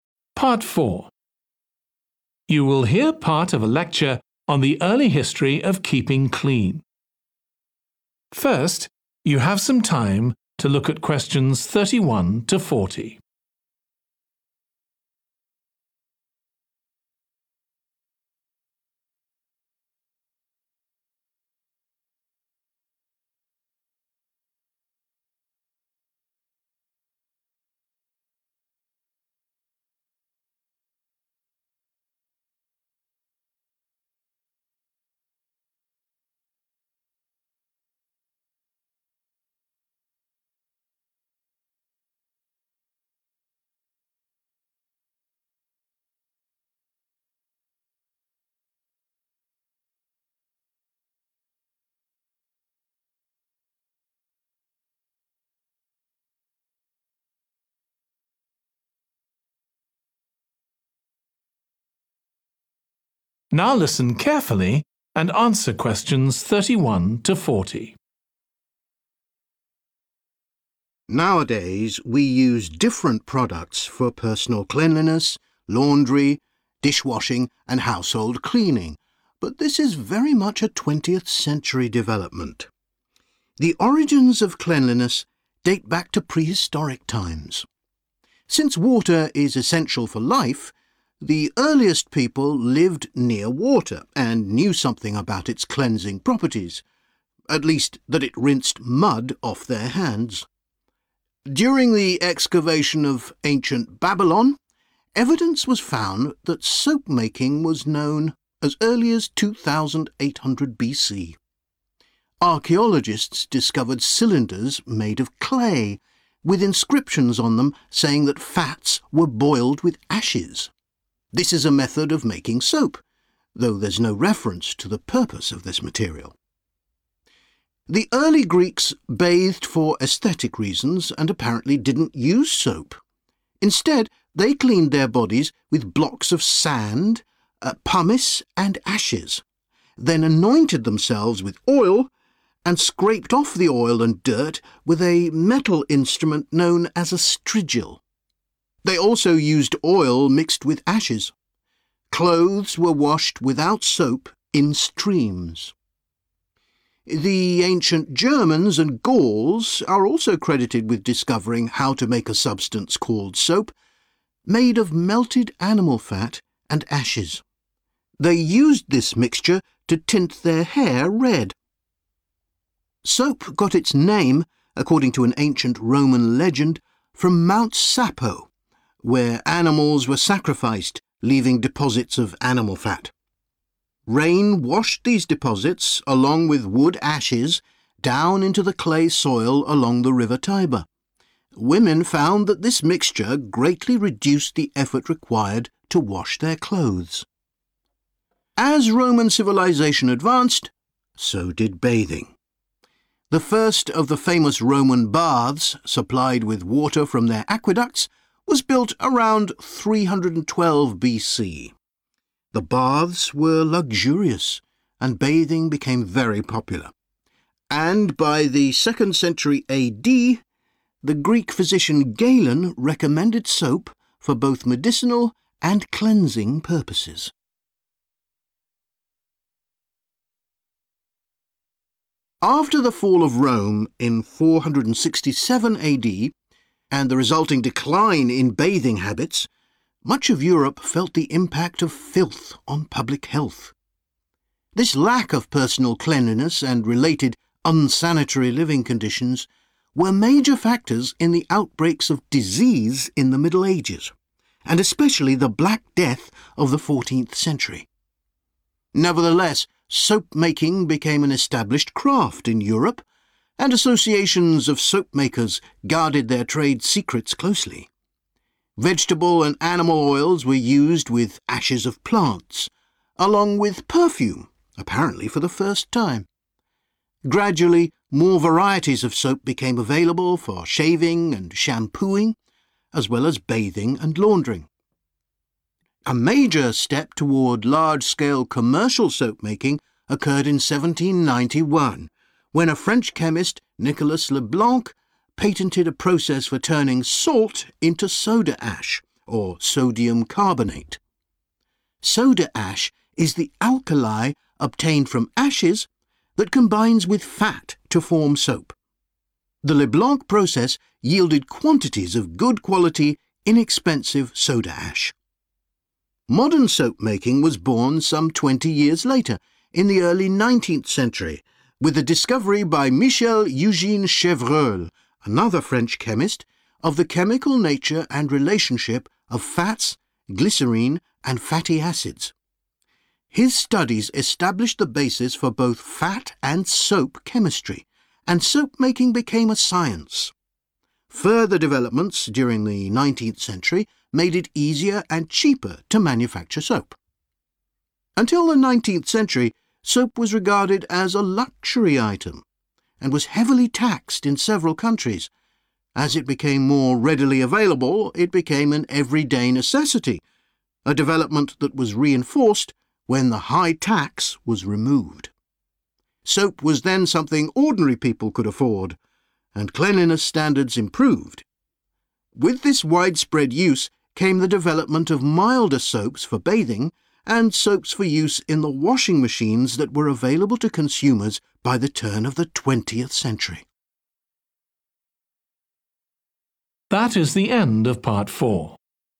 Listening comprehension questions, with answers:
Complete the notes below. Write ONE WORD ONLY for each answer.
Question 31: water was used to wash off 31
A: mud

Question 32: soap-like material found in _____ cylinders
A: clay

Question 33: used a strigil – scraper made of 33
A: metal

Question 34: used soap to colour their 34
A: hair

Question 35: from about 312 BC, water carried to Roman _____ by aqueducts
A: bath / baths

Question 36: decline in bathing contributed to occurrence of 36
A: disease / diseases

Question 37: _____ began to be added to soap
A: perfume

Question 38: 1791: Leblanc invented a way of making soda ash from 38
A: salt

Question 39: early 1800s: Chevreul turned soapmaking into a 39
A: science

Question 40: from 1800s, there was no longer a _____ on soap.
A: tax

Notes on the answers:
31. at least that it rinsed mud off their hands. Excerpt/Transcript Explanation: The transcript mentions that people used water to wash off something from their hands, like mud. Answer Explanation: The answer 'mud' refers to the dirt or soil that people might have had on their hands in prehistoric times. Reason For Correctness: The answer 'mud' fits the context because in prehistoric times, when water was used to wash off something, it was likely mud or any other dirt that people had on their hands. This aligns with the common practice of using water to remove physical debris like mud from the body.
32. Archaeologists discovered cylinders made of clay Excerpt/Transcript Explanation: The transcript talks about cylinders made of clay that have been discovered. Answer Explanation: The answer refers to a type of material called clay. Reason For Correctness: The correct answer matches the material mentioned in the excerpt, which is clay. The clay cylinders found by archaeologists are a historical indication of soap-like material being present in ancient Babylon.
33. scraped off the oil and dirt with a metal instrument known as a strigil. Excerpt/Transcript Explanation: The transcript mentions that people in Ancient Greece used a metal tool called a strigil to scrape off oil and dirt from their bodies. Answer Explanation: The answer refers to a material that is a type of solid substance made from metal. Reason For Correctness: The correct answer is 'metal' because the strigil, a tool mentioned in the text, was made of metal and used for cleaning in Ancient Greece.
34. They used this mixture to tint their hair red. Excerpt/Transcript Explanation: The transcript mentions that people in Ancient Germany and Gaul used a mixture to color their hair red. Answer Explanation: The answer refers to the body part that was tinted red by the mixture mentioned in the transcript. Reason For Correctness: The answer 'hair' is correct because the excerpt directly states that the mixture was used to tint the hair red, aligning perfectly with the context provided.
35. The first of the famous Roman baths, supplied with water from their aqueducts Excerpt/Transcript Explanation: The transcript talks about the first Roman baths that were filled with water from their aqueducts. Answer Explanation: The answer indicates that 'baths' were built to be supplied with water, which helped people clean themselves. Reason For Correctness: The correct answer directly relates to the concept of cleanliness and bathing, as mentioned in the excerpt where the Roman baths were supplied with water, emphasizing the practice of bathing for cleanliness.
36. The transcript talks about how not keeping clean and living in unsanitary conditions were big reasons for diseases during the Middle Ages, especially the Black Death. Answer Explanation: The answer 'disease' refers to illnesses or sicknesses that people can get when they are not clean or live in dirty surroundings. Reason For Correctness: The correct answer is 'disease' because the lack of personal cleanliness and unsanitary living conditions mentioned in the excerpt led to outbreaks of diseases like the Black Death in the Middle Ages.
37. Vegetable and animal oils were used with ashes of plants, along with perfume, apparently for the first time. Excerpt/Transcript Explanation: The transcript mentions that perfume was used along with oils and ashes in the creation of soap-like materials. Answer Explanation: The answer 'perfume' refers to a scented substance added to the soap-making process. Reason For Correctness: The correct answer matches the context of the excerpt where perfume was mentioned as a component used in making soap-like materials, supporting the historical practice of adding fragrance to soaps.
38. patented a process for turning salt into soda ash Excerpt/Transcript Explanation: The transcript talks about a process that was patented for transforming salt into soda ash. Answer Explanation: The answer refers to a common ingredient, salt, which was used in the process of making soda ash. Reason For Correctness: The correct answer is 'salt' because the excerpt mentions a process to turn salt into soda ash, showing that salt was a key component in the invention described.
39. His studies established the basis for both fat and soap chemistry, and soapmaking became a science. Excerpt/Transcript Explanation: The transcript talks about how studying fat and soap led to soapmaking becoming a science. Answer Explanation: The answer 'science' refers to the field of study where soapmaking was developed into a systematic and organized process. Reason For Correctness: The correct answer is 'science' because the excerpt mentions that soapmaking became a science as a result of the studies conducted on fat and soap chemistry. This implies that soapmaking transitioned from a simple practice to a more detailed and scientific discipline.
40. a development that was reinforced when the high tax was removed. Excerpt/Transcript Explanation: The transcript talks about a change that happened when a high charge on soap was removed. Answer Explanation: The answer refers to a type of fee or money that people had to pay to the government. Reason For Correctness: The correct answer is 'tax' because it fits the context of the excerpt where the removal of a high tax on soap is being discussed as a significant development.

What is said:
Nowadays, we use different products for personal cleanliness, laundry, dishwashing and household cleaning, but this is very much a 20th-century development.
The origins of cleanliness date back to prehistoric times. Since water is essential for life, the earliest people lived near water and knew something about its cleansing properties – at least that it rinsed mud off their hands.
During the excavation of ancient Babylon, evidence was found that soapmaking was known as early as 2800 BC. Archaeologists discovered cylinders made of clay, with inscriptions on them saying that fats were boiled with askes. This is a method of making soap, though there's no reference to the purpose of this material.
The early Greeks bathed for aesthetic reasons and apparently didn't use soap. Instead, they cleaned their bodies with blocks of sand, pumice and ashes, then anointed themselves with oil, and scraped off the oil and dirt with a metal instrument known as a strigil. They also used oil mixed with ashes. Clothes were washed without soap in streams.
The ancient Germans and Gauls are also credited with discovering how to make a substance called 'soap', made of melted animal fat and ashes. They used this mixture to tint their hair red.
Soap got its name, according to an ancient Roman legend, from Mount Sapo, where animals were sacrificed, leaving deposits of animal fat. Rain washed these deposits, along with wood ashes, down into the clay soil along the River Tiber. Women found that this mixture greatly reduced the effort required to wash their clothes.
As Roman civilisation advance, so did bathing. The first of the famous Roman baths, supplied with water from their aqueducts, was built around 312 BC. The baths were luxurious, and bathing became very popular. And by the second century AD, the Greek physician Galen recommended soap for both medicinal and cleaning purposes.
After the fall of Rome in 467 AD and the resulting decline in bathing habits, much of Europe felt the impact of filth on public health. This lack of personal cleanliness and related unsanitary living conditions were major factors in the outbreaks of disease in the Middle Ages, and especially the Black Death of the 14th century.
Nevertheless, soapmaking became an established craft in Europe, and associations of soapmakers guarded their trade secrets closely. Vegetable and animal oils were used with ashes of plants, along with perfume, apparently for the first time. Gradually more varieties of soap became available for shaving and shampooing, as well as bathing and laundering.
A major step toward large-scale commercial soapmaking occurred in 1791, when a French chemist, Nicholas Leblanc, patented a process for turning salt into soda ash, or sodium carbonate. Soda ash is the alkali obtained from ashes that combines with fat to form soap. The Leblanc process yielded quantities of good-quality, inexpensive soda ash.
Modern soapmaking was born some 20 years later, in the early 19th century, with the discovery by Michel Eugène Chevreul, another French chemist, of the chemical nature and relationship of fats, glycerine and fatty acids. His studies established the basis for both fat and soap chemistry, and soapmaking became a science. Further developments during the 19th century made it easier and cheaper to manufacture soap.
Until the 19th century, soap was regarded as a luxury item, and was heavily taxed in several countries. As it became more readily available, it became an everyday necessity, a development that was reinforced when the high tax was removed. Soap was then something ordinary people could afford, and cleanliness standards improved.
With this widespread use came the development of milder soaps for bathing and soaps for use in the washing machines that were available to consumers by the turn of the 20th century.